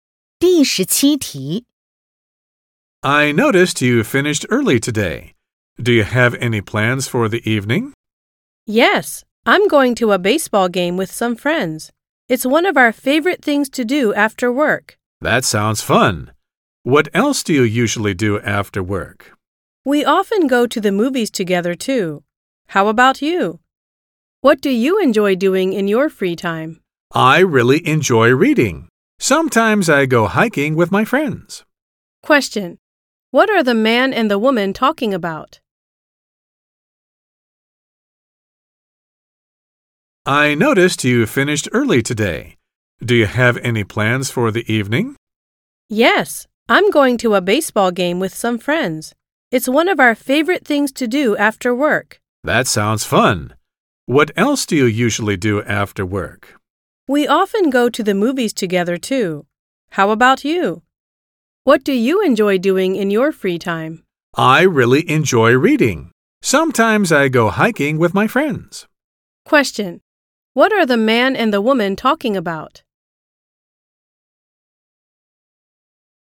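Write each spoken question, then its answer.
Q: What are the man and the woman talking about?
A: What they do after work / in their free time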